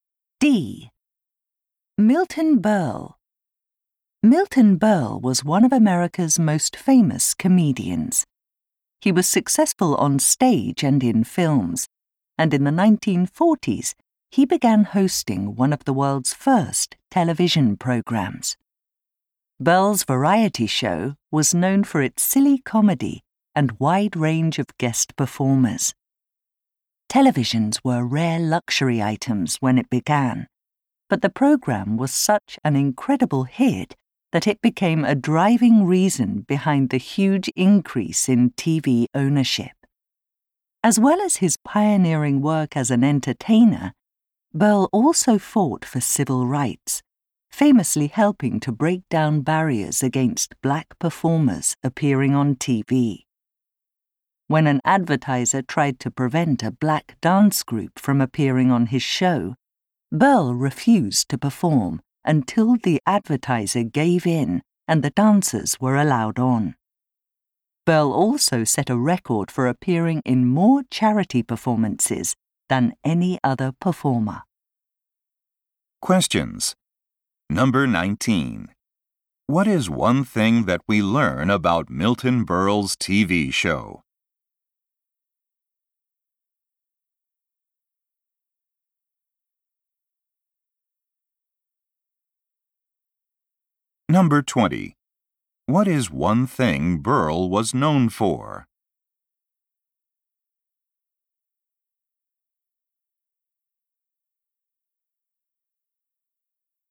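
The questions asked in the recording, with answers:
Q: What is one thing that we learn about Milton Berle's TV show?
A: It drove a huge increase in TV ownership.

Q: What is one thing Berle was known for?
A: Fighting for civil rights and doing many charity performances.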